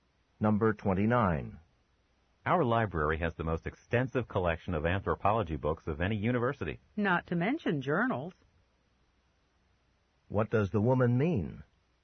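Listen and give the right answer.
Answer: The library also has the biggest collection of anthropology journals.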